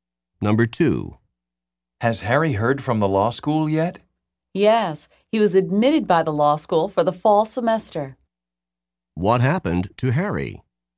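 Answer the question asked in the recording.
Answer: He was admitted to law school for the fall semester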